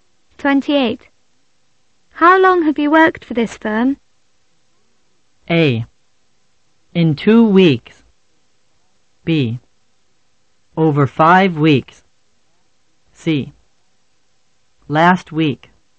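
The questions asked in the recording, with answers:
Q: How long have you worked for this firm?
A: B: Over 5 weeks.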